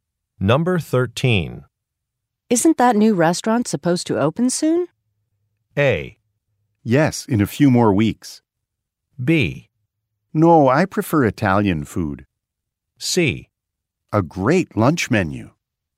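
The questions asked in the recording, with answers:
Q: Isn't that new restaurant supposed to open soon?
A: A: Yes, in a few more weeks.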